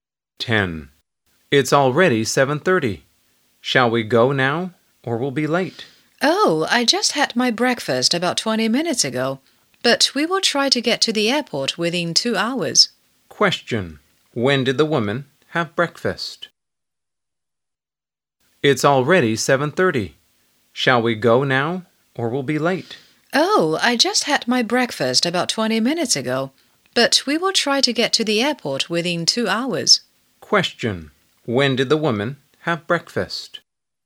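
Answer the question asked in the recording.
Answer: At about 7:10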